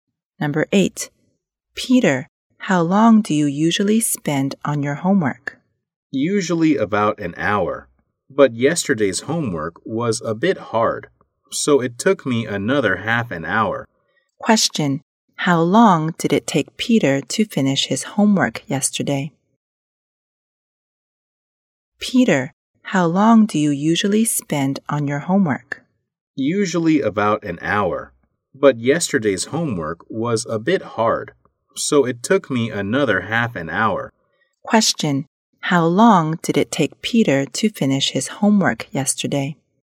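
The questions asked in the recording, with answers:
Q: How long did it take Peter to finish his homework yesterday?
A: An hour and a half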